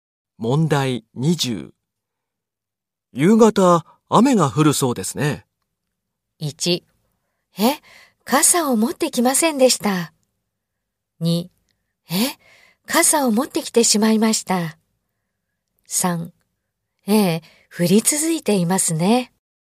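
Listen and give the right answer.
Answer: 1: え、傘を持ってきませんでした。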